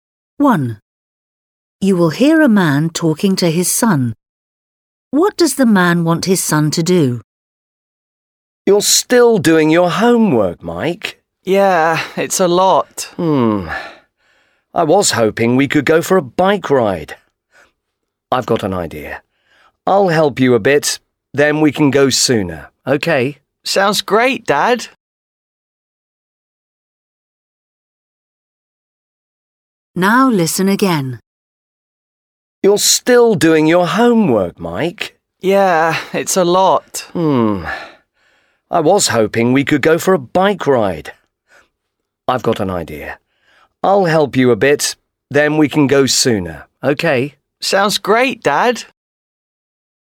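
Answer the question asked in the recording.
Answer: go for a bike ride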